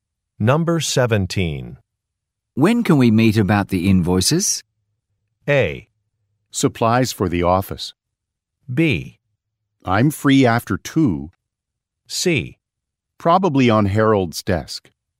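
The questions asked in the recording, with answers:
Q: When can we meet about the invoices?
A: B: I'm free after 2.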